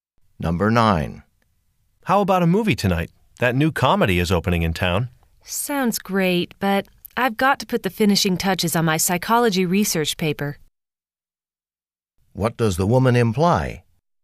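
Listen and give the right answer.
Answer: She can't go to the movie because she has to finish her research paper.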